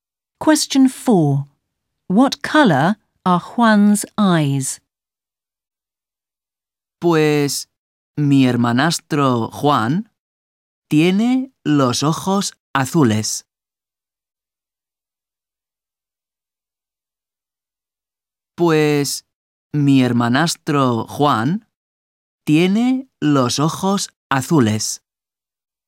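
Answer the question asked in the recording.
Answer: Blue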